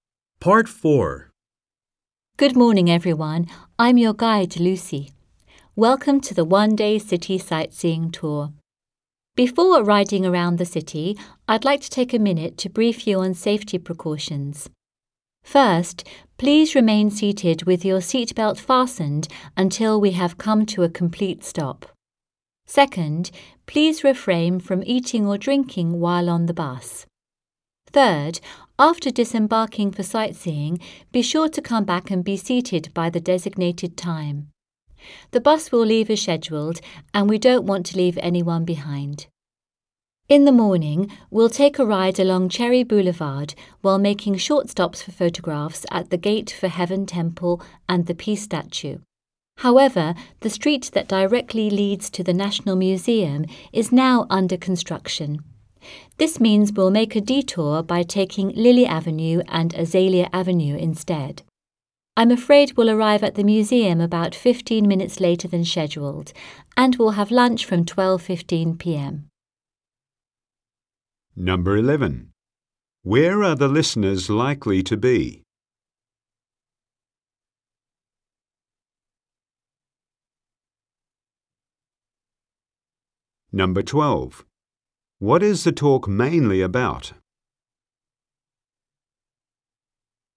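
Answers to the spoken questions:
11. On a tour bus
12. Safety precautions for the city tour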